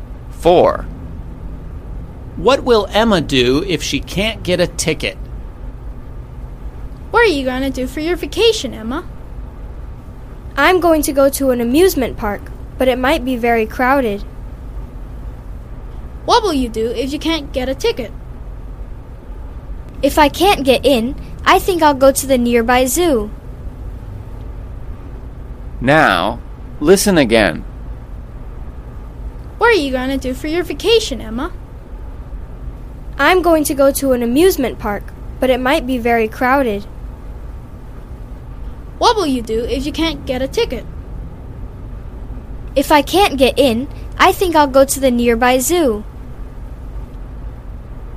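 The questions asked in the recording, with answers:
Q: What will Emma do if she can't get a ticket?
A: Go to the nearby zoo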